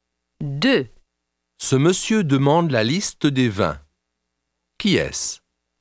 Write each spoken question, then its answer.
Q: Qui est-ce?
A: C'est un client.